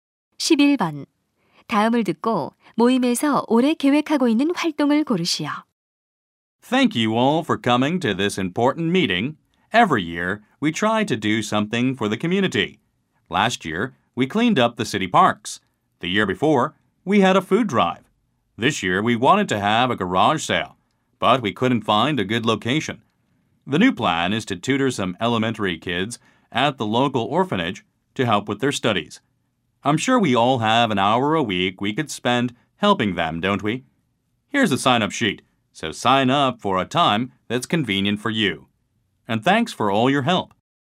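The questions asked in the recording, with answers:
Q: 다음을 듣고 모임에서 올해 계획하고 있는 활동을 고르시오.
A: 고아원 초등학생 공부 가르치기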